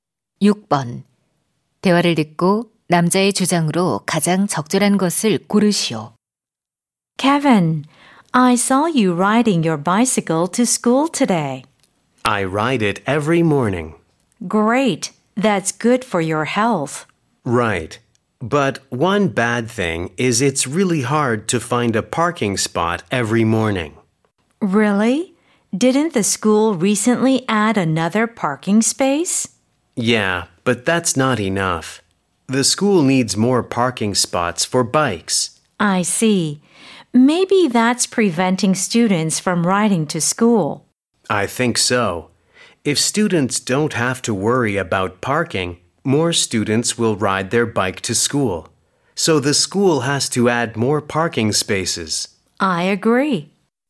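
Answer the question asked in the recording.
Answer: 학교에 자전거 주차 공간을 더 늘려야 한다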